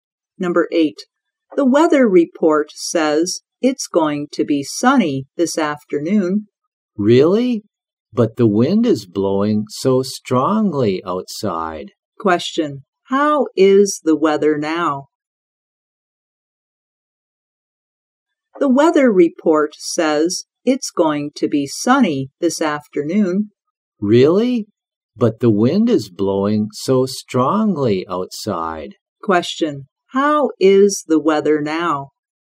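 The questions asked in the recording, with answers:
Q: How is the weather now?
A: Windy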